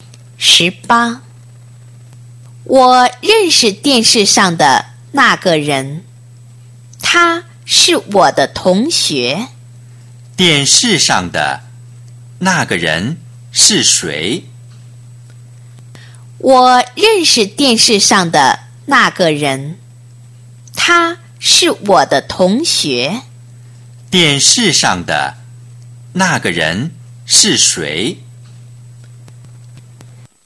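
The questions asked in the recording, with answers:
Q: 电视上的那个人是谁?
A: 他的同学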